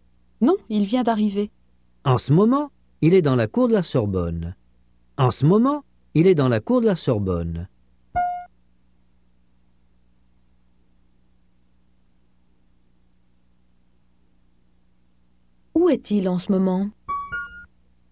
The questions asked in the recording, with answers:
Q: Où est-il en ce moment ?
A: Dans la cour de la Sorbonne.